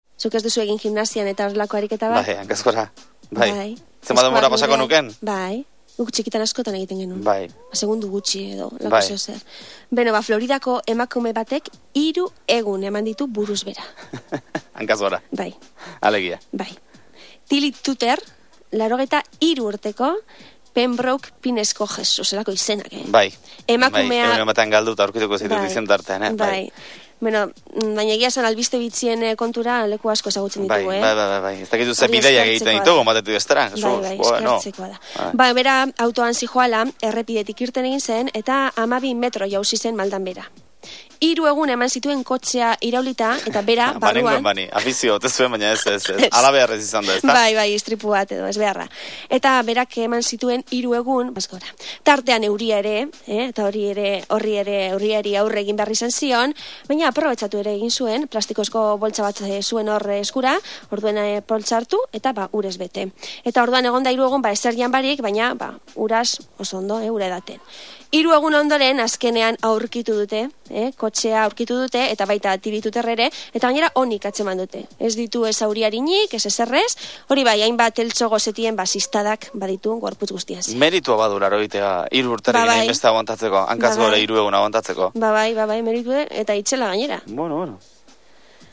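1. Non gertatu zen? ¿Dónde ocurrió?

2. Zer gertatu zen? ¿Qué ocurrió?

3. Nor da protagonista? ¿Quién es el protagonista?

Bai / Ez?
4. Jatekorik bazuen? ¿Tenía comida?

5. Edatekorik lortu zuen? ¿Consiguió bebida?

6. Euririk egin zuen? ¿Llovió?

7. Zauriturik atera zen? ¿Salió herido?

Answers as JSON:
{"1": "Floridan", "2": "Emakume bat kotxean zihoala, errepidetik atera eta 12 metro maldan behera erori zen. Hiru egun pasa zituen buruz behera kotxean sartuta, poliziak aurkitu arte", "3": "Floridako 83 urteko emakume bat", "4": "Ez", "5": "Bai", "6": "Bai", "7": "Ez"}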